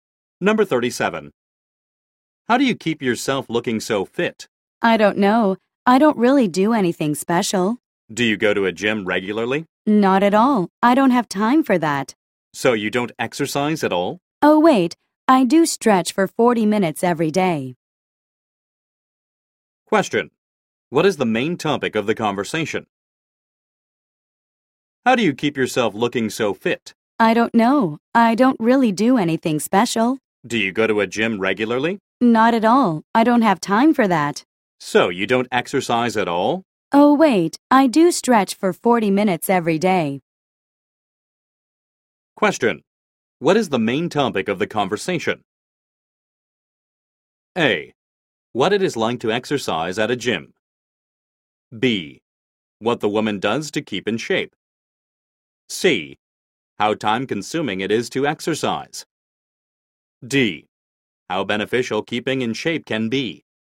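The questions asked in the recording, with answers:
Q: What is the main topic of the conversation?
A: B: What the woman does to keep in shape.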